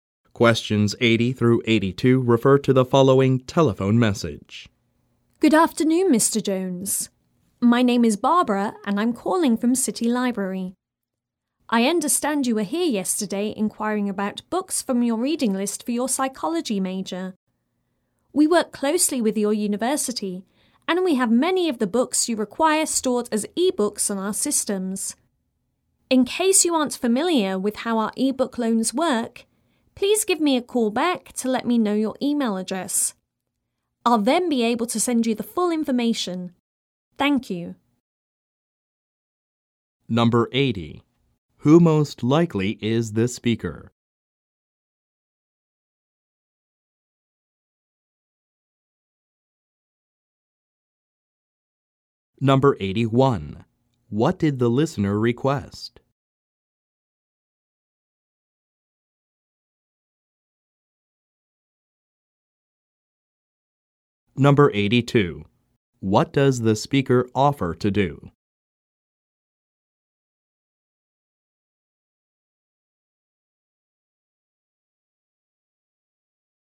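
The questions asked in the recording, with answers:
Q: Who most likely is the speaker?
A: A library employee

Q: What did the listener request?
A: Books from his psychology reading list

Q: What does the speaker offer to do?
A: Send him full information on e-book loans by email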